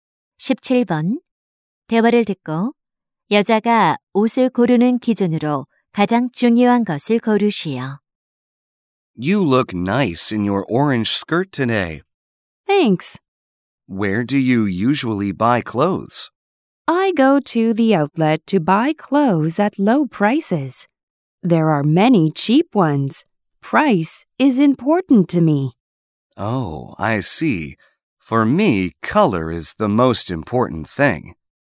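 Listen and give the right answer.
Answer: 가격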